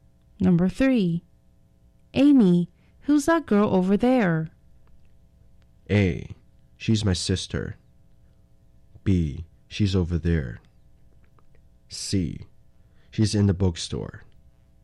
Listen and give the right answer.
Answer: 所以答案要选的是 A, She's my sister, 那是我姐妹哦。